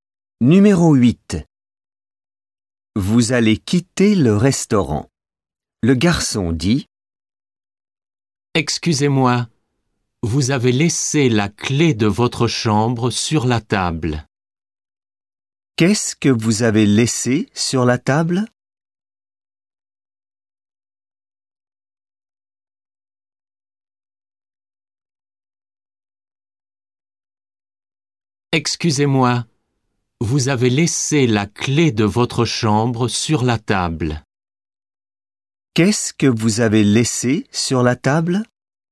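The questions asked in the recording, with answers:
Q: Qu'est-ce que vous avez laissé sur la table?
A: La clé de votre chambre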